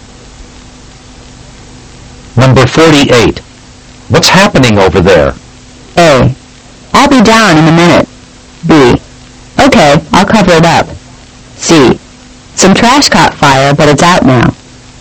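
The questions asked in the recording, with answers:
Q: What's happening over there?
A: C: Some trash caught fire, but it's out now.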